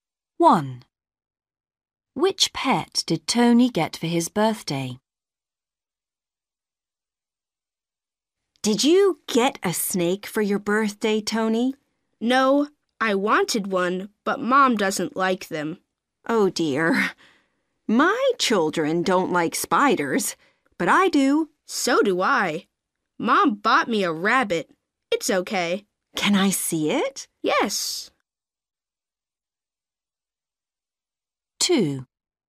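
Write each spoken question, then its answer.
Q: Which pet did Tony get for his birthday?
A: a rabbit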